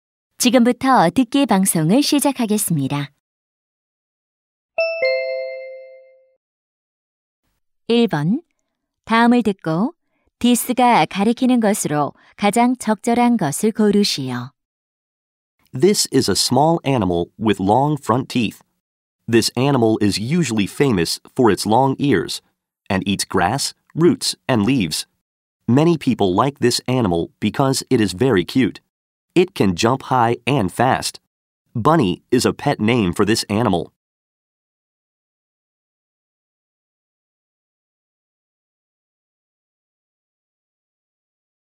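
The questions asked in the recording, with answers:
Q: 다음을 듣고 디스가 가리키는 것으로 가장 적절한 것을 고르시오.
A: 토끼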